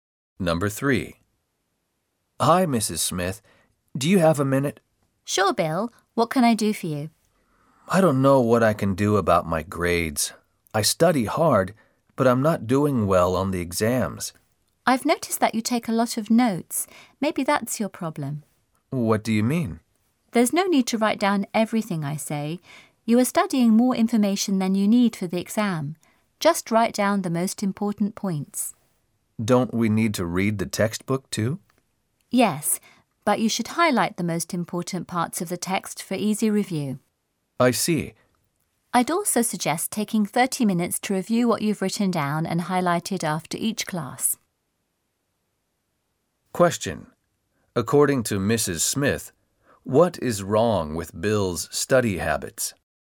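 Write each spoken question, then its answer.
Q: According to Mrs. Smith, what is wrong with Bill's study habits?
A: He writes down too much in his notes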